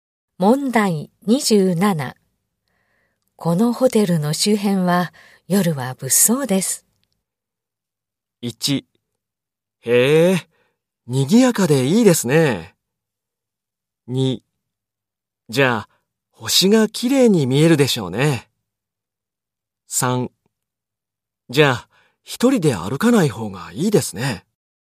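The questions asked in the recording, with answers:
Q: このホテルの周辺は夜は物騒です。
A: 3: じゃあ、一人で歩かない方がいいですね。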